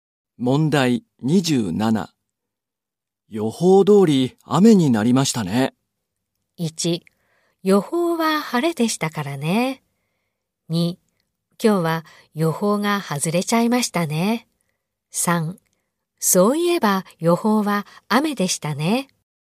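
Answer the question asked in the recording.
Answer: 3: そういえば予報は雨でしたね。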